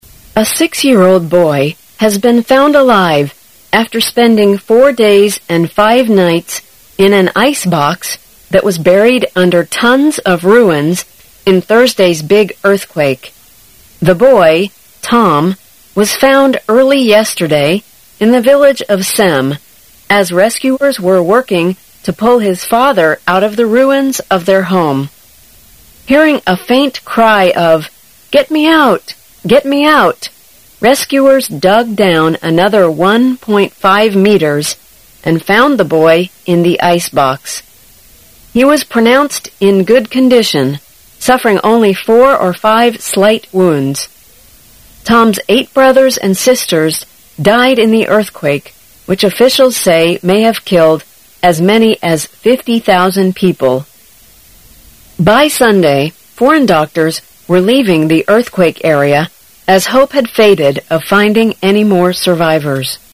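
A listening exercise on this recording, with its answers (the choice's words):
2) How many days had passed before the boy was rescued?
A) About four days.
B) Around eight days.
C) A day and a half.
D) More than six days.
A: About four days.

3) How did the boy survive the big earthquake?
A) His father pulled him out in time.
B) He stayed in an icebox.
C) He left the area before the earthquake.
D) Their house escaped the earthquake.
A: He stayed in an icebox.

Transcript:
[解析] 14-16 A six-year-old boy has been found alive after spending four days and five nights in an icebox that was buried under tons of ruins in Thursday's big earthquake. The boy, Tom, was found early yesterday in the village of Sem as rescuers were working to pull his father out of the ruins of their home. Hearing a faint cry of "Get me out. Get me out", rescuers dug down another one point five meters and found the boy in the icebox. 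He was pronounced in good condition, suffering only four or five slight wounds. Tom's eight brothers and sisters died in the earthquake which officials say may have killed as many as 50,000 people. By Sunday foreign doctors were leaving the earthquake area as hope had faded of finding any more survivors.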